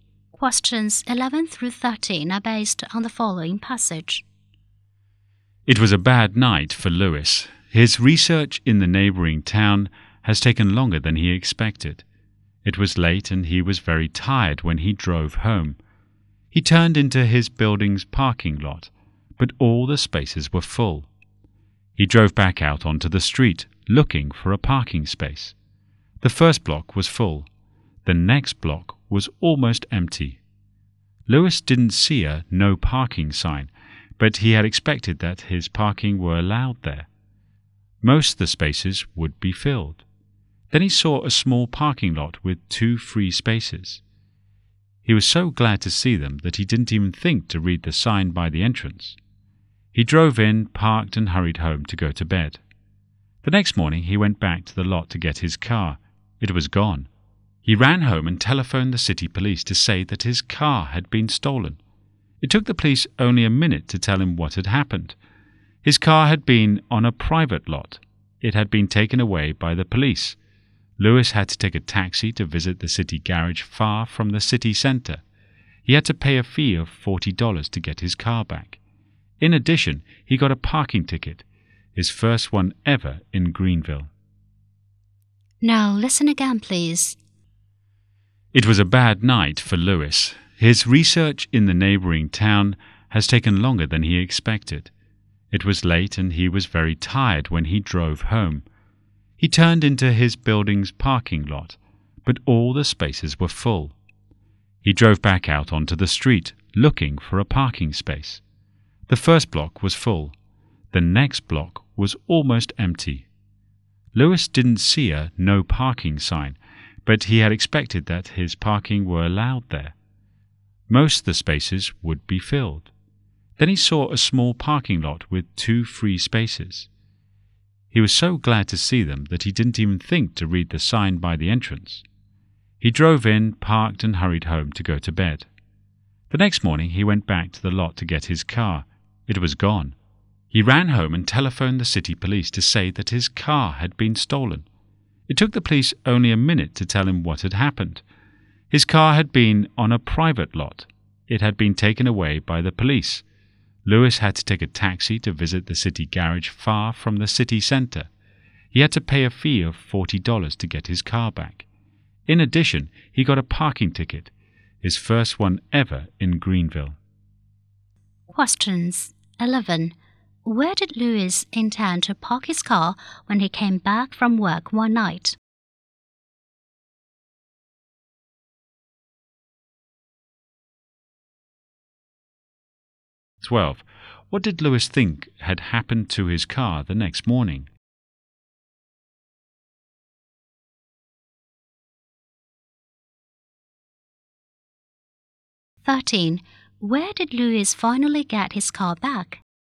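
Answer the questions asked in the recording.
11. In his building's parking lot
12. It had been stolen
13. At the city garage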